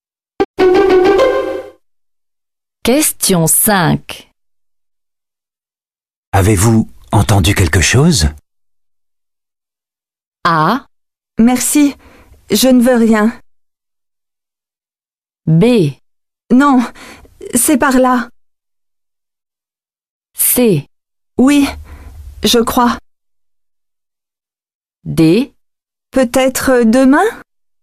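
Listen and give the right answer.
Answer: C: Oui, je crois.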